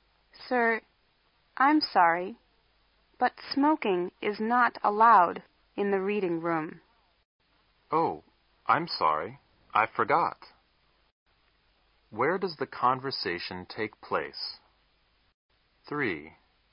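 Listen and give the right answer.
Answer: In the reading room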